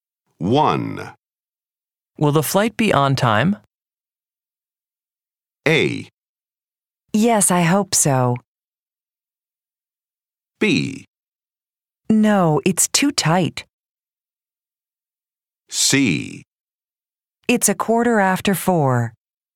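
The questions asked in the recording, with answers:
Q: Will the flight be on time?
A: A: Yes, I hope so.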